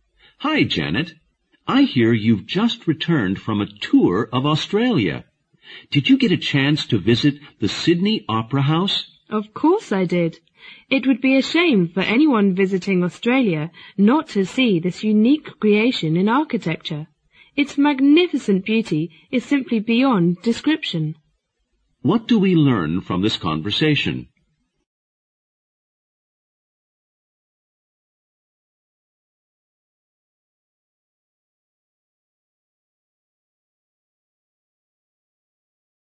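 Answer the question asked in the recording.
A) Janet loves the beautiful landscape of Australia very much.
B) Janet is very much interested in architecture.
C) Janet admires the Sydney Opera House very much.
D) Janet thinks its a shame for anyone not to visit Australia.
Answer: C) Janet admires the Sydney Opera House very much.

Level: 六级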